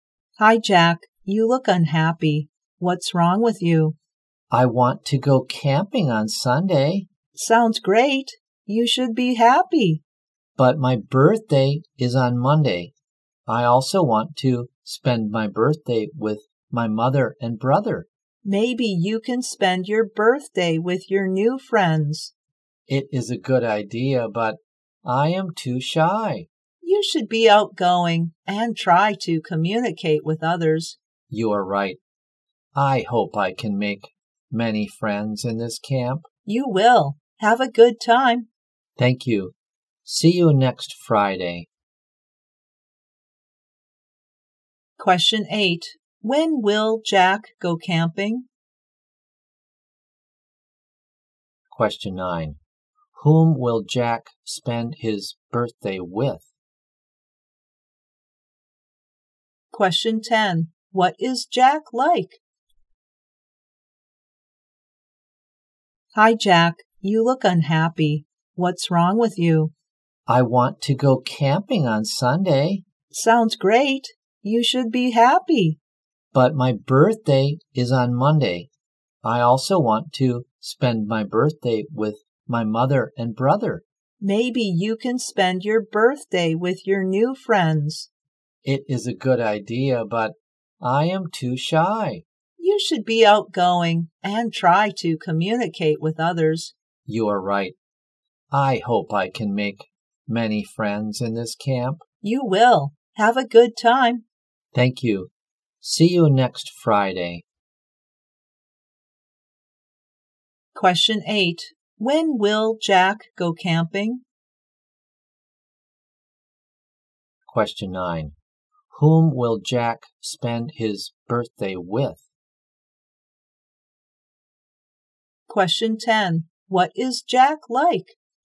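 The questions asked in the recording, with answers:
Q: When will Jack go camping?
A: On Sunday

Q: What is Jack like?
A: Shy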